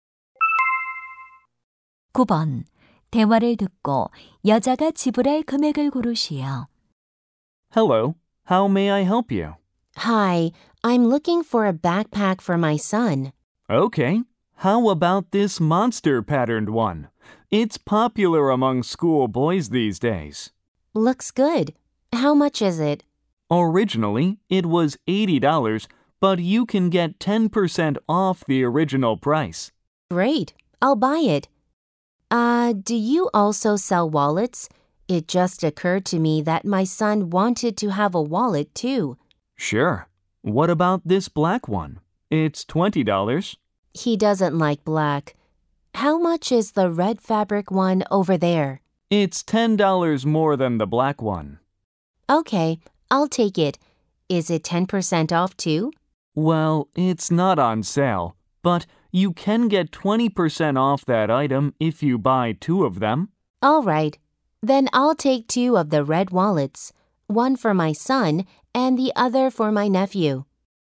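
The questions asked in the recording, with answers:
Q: 대화를 듣고 여자가 지불할 금액을 고르시오.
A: $120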